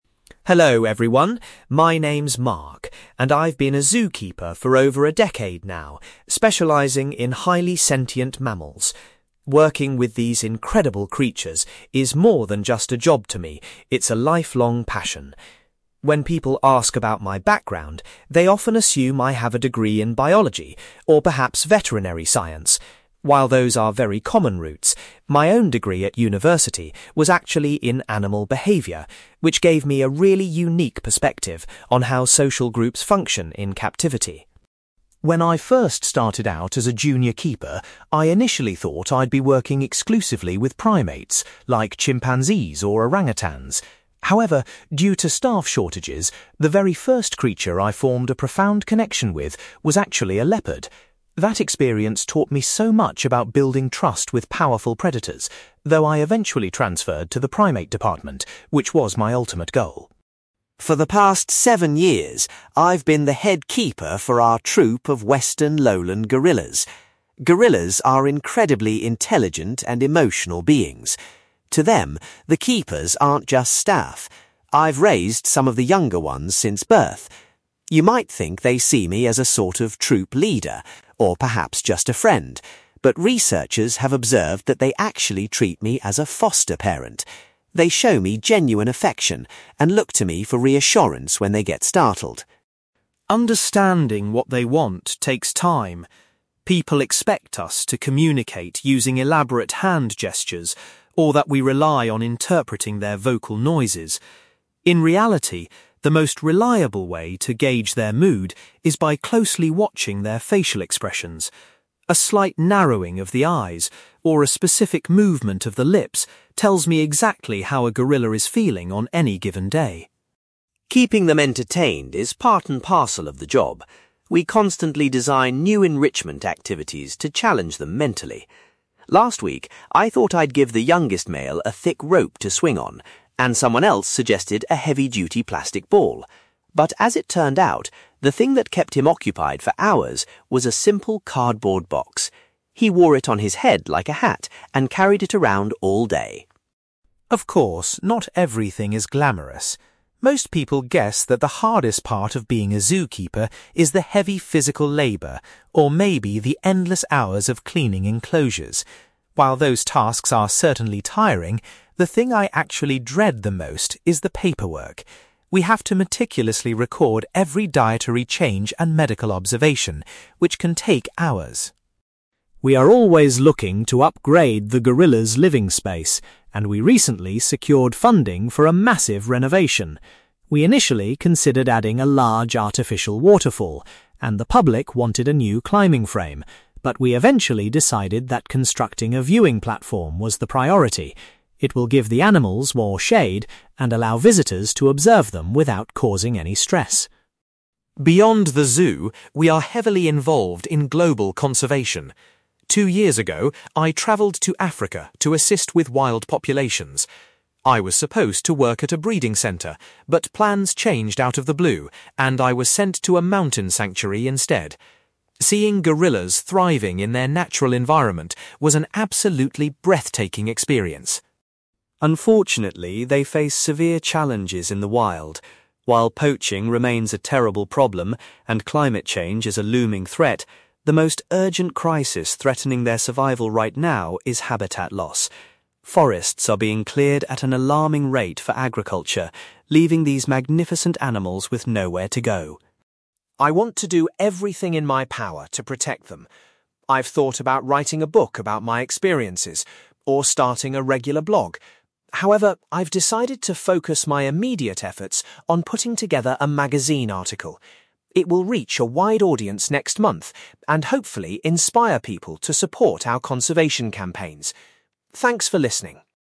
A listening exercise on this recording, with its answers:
You will hear a zookeeper called Mark giving a talk about his work with highly sentient mammals. For questions 9-18, complete the sentences with a word or short phrase.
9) Mark explains that he chose to study (9) .......................................... at university rather than biology.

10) Mark was surprised that a (10) .......................................... was the first animal he developed a close bond with.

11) According to researchers, the younger gorillas regard Mark as a (11) .......................................... .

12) Mark relies mostly on the gorillas' (12) .......................................... to understand how they are feeling.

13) Mark mentions that a young gorilla was highly entertained by a (13) .......................................... .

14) Mark admits that dealing with the (14) .......................................... is his least favourite aspect of the job.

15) The zoo has chosen to build a new (15) .......................................... for the gorilla enclosure.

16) During his trip to Africa, Mark spent time working at a (16) .......................................... .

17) Mark highlights (17) .......................................... as the biggest danger to wild gorillas today.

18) Mark is currently writing a (18) .......................................... to educate the public about conservation.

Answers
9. animal behaviour
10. leopard
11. foster parent
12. facial expressions
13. cardboard box
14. paperwork
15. viewing platform
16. mountain sanctuary
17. habitat loss
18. magazine article

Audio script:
Mark: Hello everyone, my name is Mark and I've been a zookeeper for over a decade now, specialising in highly sentient mammals. Working with these incredible creatures is more than just a job to me; it's a lifelong passion. When people ask about my background, they often assume I have a degree in biology or perhaps veterinary science. While those are very common routes, my own degree at university was actually in animal behaviour, which gave me a really unique perspective on how social groups function in captivity.
When I first started out as a junior keeper, I initially thought I'd be working exclusively with primates, like chimpanzees or orangutans. However, due to staff shortages, the very first creature I formed a profound connection with was actually a leopard. That experience taught me so much about building trust with powerful predators, though I eventually transferred to the primate department, which was my ultimate goal.
For the past seven years, I've been the head keeper for our troop of western lowland gorillas. Gorillas are incredibly intelligent and emotional beings. To them, the keepers aren't just staff. I've raised some of the younger ones since birth. You might think they see me as a sort of troop leader, or perhaps just a friend, but researchers have observed that they actually treat me as a foster parent. They show me genuine affection and look to me for reassurance when they get startled.
Understanding what they want takes time. People expect us to communicate using elaborate hand gestures, or that we rely on interpreting their vocal noises. In reality, the most reliable way to gauge their mood is by closely watching their facial expressions. A slight narrowing of the eyes or a specific movement of the lips tells me exactly how a gorilla is feeling on any given day.
Keeping them entertained is part and parcel of the job. We constantly design new enrichment activities to challenge them mentally. Last week, I thought I'd give the youngest male a thick rope to swing on, and someone else suggested a heavy-duty plastic ball. But as it turned out, the thing that kept him occupied for hours was a simple cardboard box. He wore it on his head like a hat and carried it around all day!
Of course, not everything is glamorous. Most people guess that the hardest part of being a zookeeper is the heavy physical labour, or maybe the endless hours of cleaning enclosures. While those tasks are certainly tiring, the thing I actually dread the most is the paperwork. We have to meticulously record every dietary change and medical observation, which can take hours.
We are always looking to upgrade the gorillas' living space, and we recently secured funding for a massive renovation. We initially considered adding a large artificial waterfall, and the public wanted a new climbing frame, but we eventually decided that constructing a viewing platform was the priority. It will give the animals more shade and allow visitors to observe them without causing any stress.
Beyond the zoo, we are heavily involved in global conservation. Two years ago, I travelled to Africa to assist with wild populations. I was supposed to work at a breeding centre, but plans changed out of the blue, and I was sent to a mountain sanctuary instead. Seeing gorillas thriving in their natural environment was an absolutely breathtaking experience.
Unfortunately, they face severe challenges in the wild. While poaching remains a terrible problem, and climate change is a looming threat, the most urgent crisis threatening their survival right now is habitat loss. Forests are being cleared at an alarming rate for agriculture, leaving these magnificent animals with nowhere to go.
I want to do everything in my power to protect them. I've thought about writing a book about my experiences, or starting a regular blog. However, I've decided to focus my immediate efforts on putting together a magazine article. It will reach a wide audience next month and hopefully inspire people to support our conservation campaigns. Thanks for listening.

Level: B2